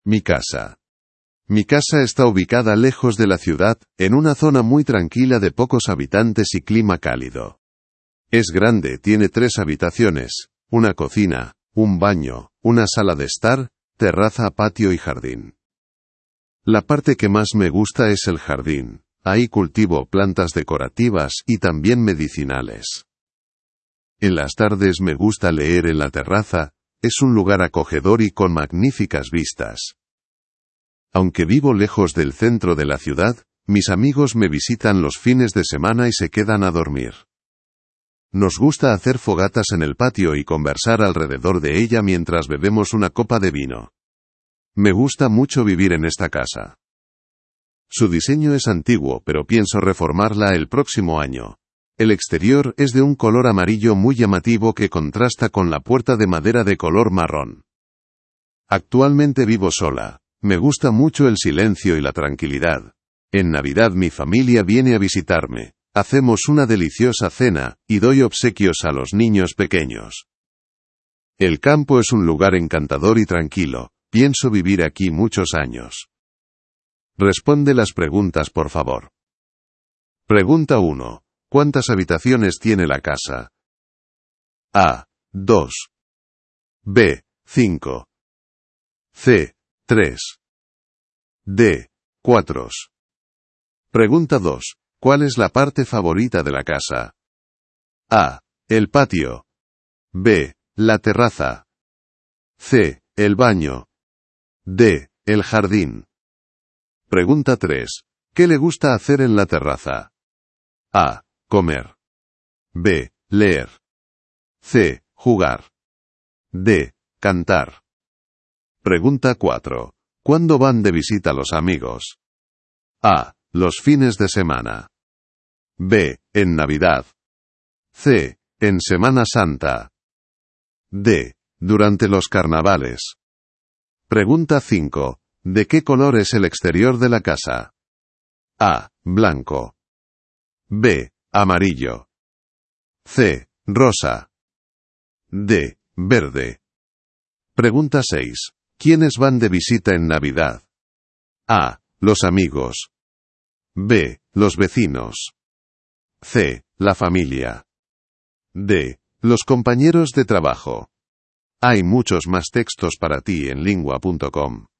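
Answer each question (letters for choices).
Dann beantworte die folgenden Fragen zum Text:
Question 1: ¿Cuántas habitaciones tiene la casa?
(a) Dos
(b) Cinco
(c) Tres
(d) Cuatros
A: c

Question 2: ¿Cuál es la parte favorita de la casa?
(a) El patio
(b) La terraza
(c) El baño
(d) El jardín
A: d

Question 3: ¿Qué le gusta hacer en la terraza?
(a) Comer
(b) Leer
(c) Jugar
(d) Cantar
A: b

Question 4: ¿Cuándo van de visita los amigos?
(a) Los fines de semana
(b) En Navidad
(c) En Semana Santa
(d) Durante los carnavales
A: a

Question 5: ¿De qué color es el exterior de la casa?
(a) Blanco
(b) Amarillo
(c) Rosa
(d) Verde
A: b

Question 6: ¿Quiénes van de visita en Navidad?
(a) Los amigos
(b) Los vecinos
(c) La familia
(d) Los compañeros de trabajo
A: c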